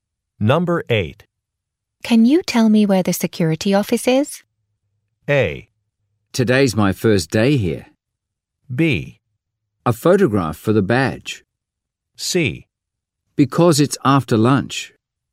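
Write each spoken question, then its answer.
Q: Can you tell me where the security office is?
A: A: Today's my first day here.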